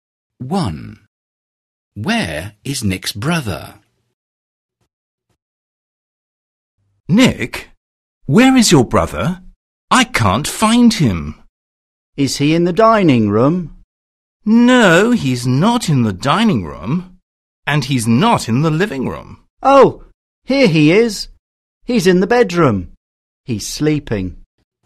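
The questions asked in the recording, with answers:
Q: Where is Nick's brother?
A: In the bedroom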